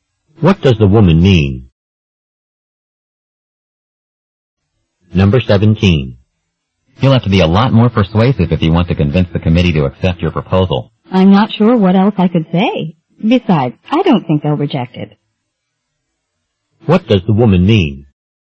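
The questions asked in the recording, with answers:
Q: What does the woman mean?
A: She thinks the committee will accept her proposal anyway.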